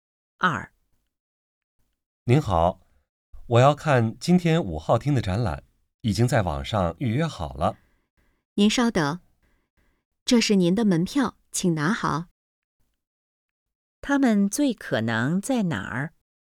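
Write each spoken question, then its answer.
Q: 他们最可能在哪儿?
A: 展览馆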